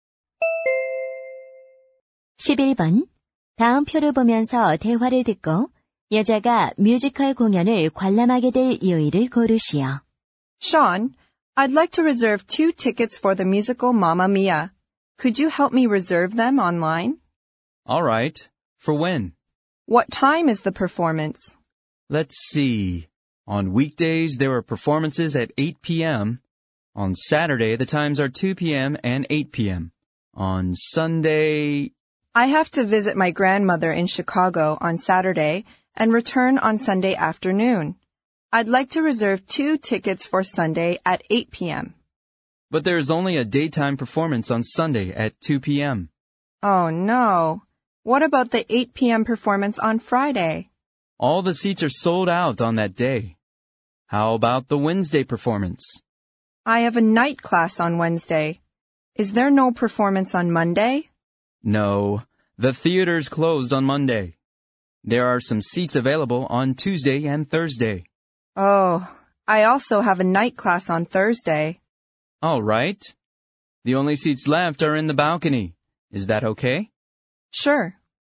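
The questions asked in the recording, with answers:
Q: 다음 표를 보면서 대화를 듣고 여자가 뮤지컬 공연을 관람하게 될 요일을 고르시오.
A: 화요일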